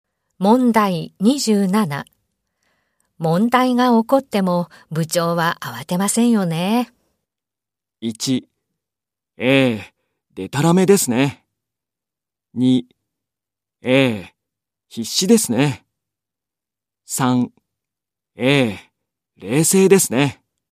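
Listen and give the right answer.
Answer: 3: ええ、冷静ですね。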